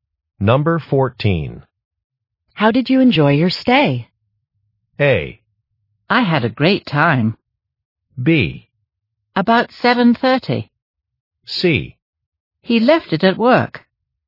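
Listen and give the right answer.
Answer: A: I had a great time.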